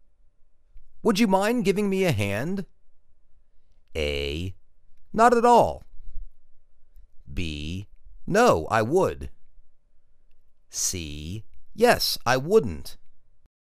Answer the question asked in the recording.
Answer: Not at all